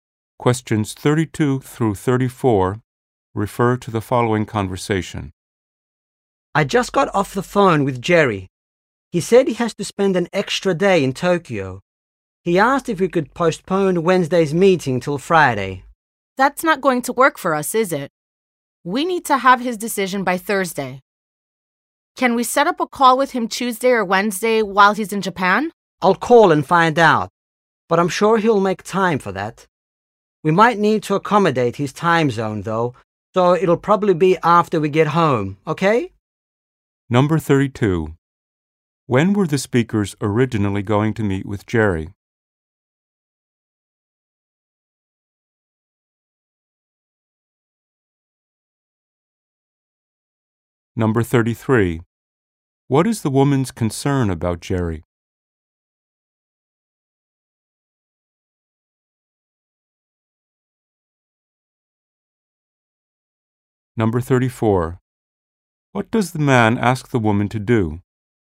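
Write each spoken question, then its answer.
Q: When were the speakers originally going to meet with Jerry?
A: On Wednesday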